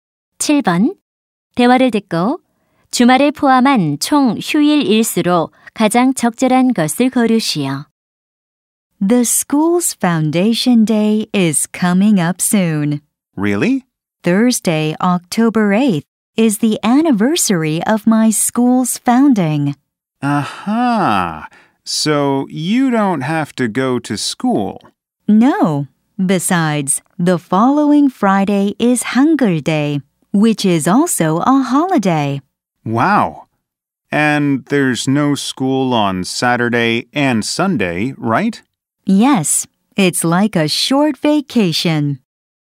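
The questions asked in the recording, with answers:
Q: 대화를 듣고 주말을 포함한 총 휴일 일수로 가장 적절한 것을 거르시오.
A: 4일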